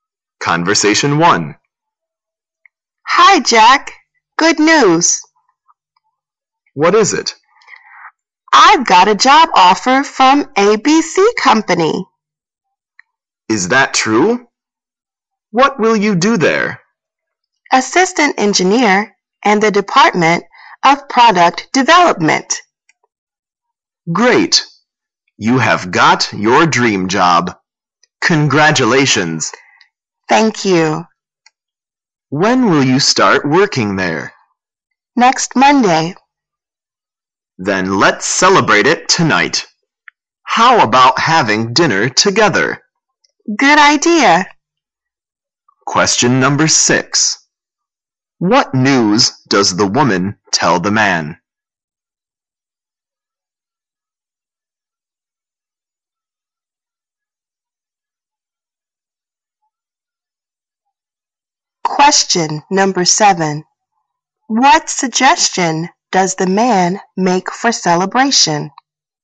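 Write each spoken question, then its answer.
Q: What news does the woman tell the man?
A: She got a job offer from ABC Company

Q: What suggestion does the man make for celebration?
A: Having dinner together tonight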